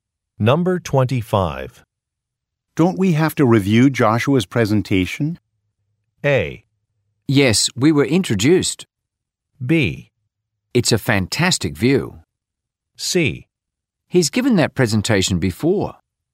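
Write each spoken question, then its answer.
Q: Don't we have to review Joshua's presentation?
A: C: He's given that presentation before.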